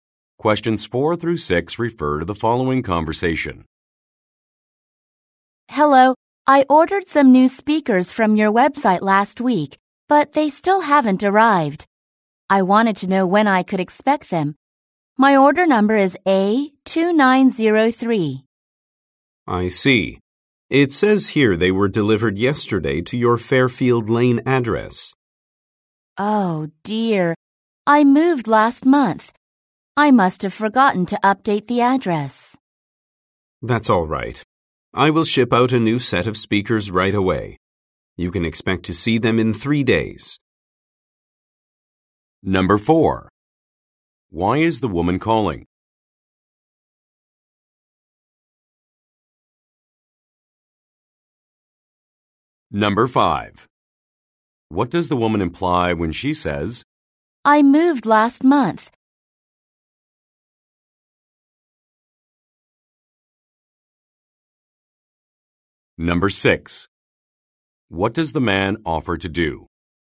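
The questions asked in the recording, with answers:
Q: Why is the woman calling?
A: To ask when her speakers will arrive.

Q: What does the woman imply when she says,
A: The speakers were delivered to her old address.

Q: What does the man offer to do?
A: Ship out a new set of speakers.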